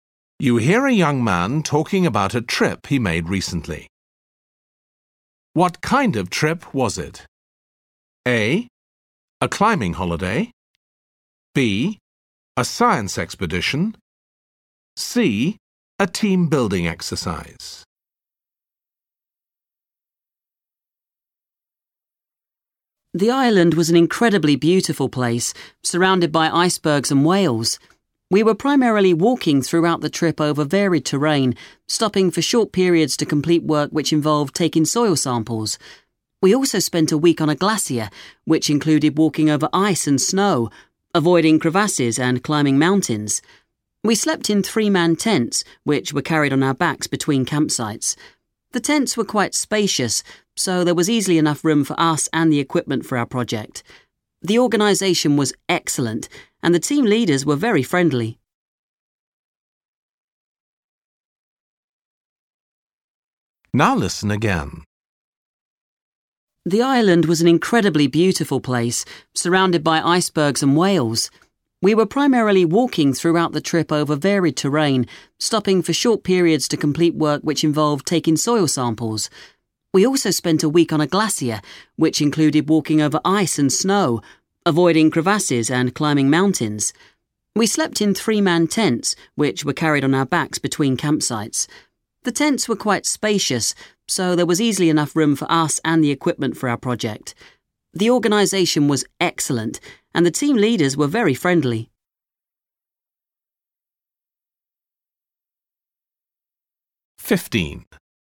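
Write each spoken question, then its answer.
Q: What kind of trip was it?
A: B: A science expedition.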